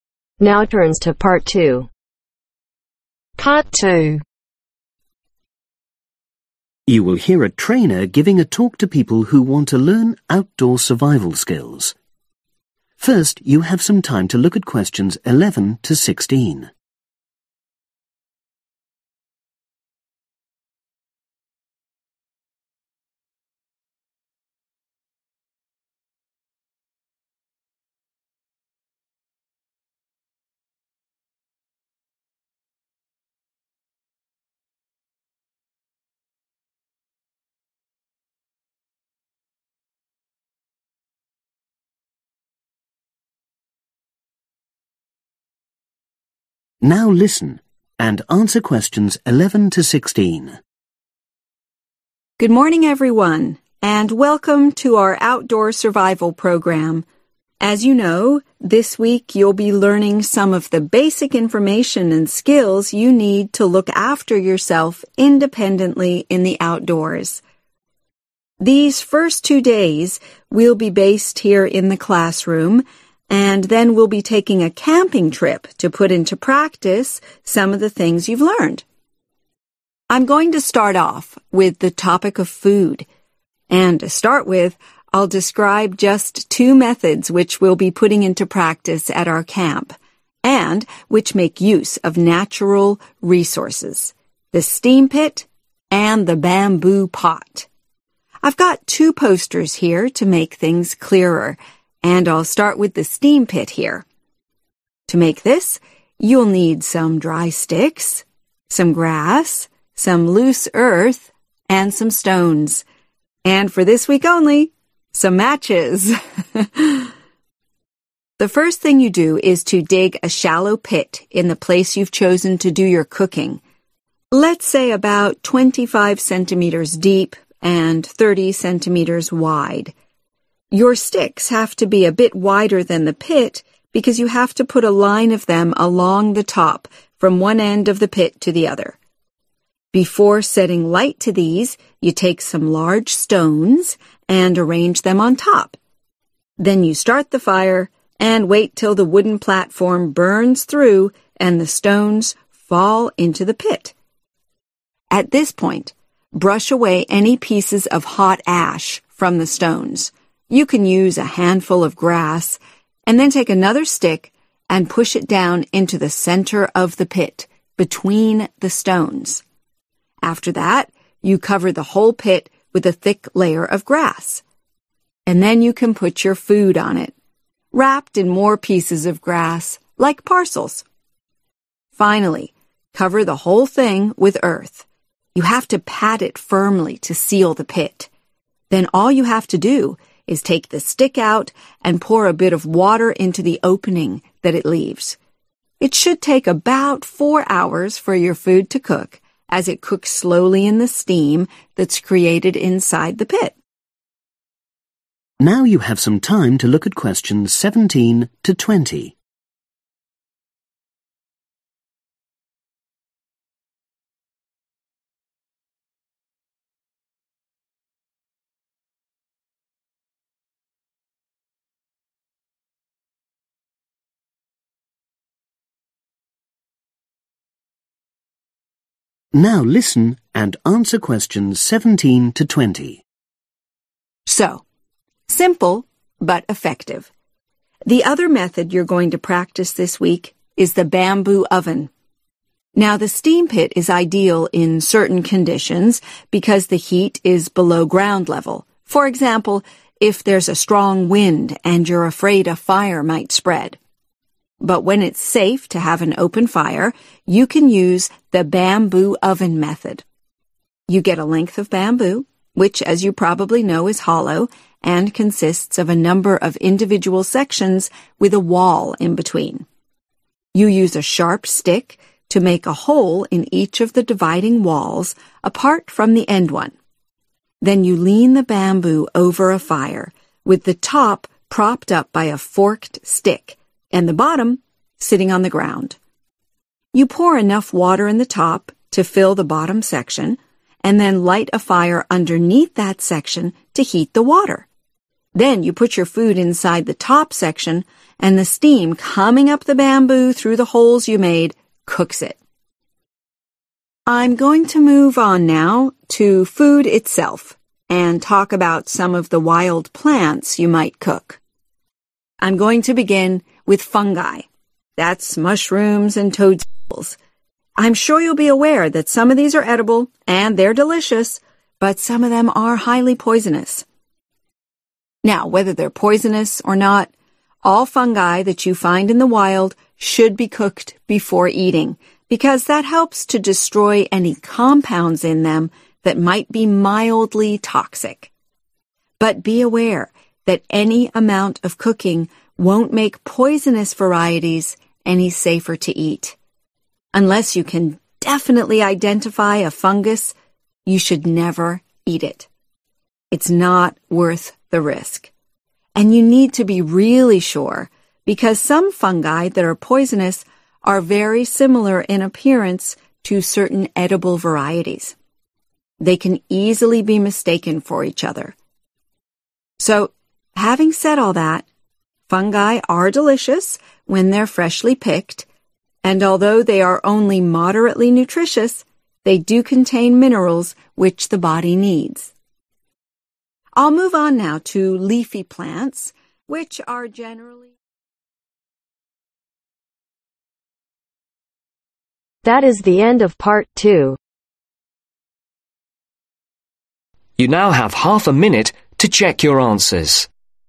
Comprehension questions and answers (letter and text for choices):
Choose correct letter from A-G.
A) air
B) ash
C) earth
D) grass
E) sticks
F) stones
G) water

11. Arrange a row of (11)............ over the pit.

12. Place (12)............ on top.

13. Remove (13)............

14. Cover the pit with (14)............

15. Place wrapped food on top, and cover it with (15)............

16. Remove the stick and put (16)............ into the hole.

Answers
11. E) sticks
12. F) stones
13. B) ash
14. D) grass
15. C) earth
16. G) water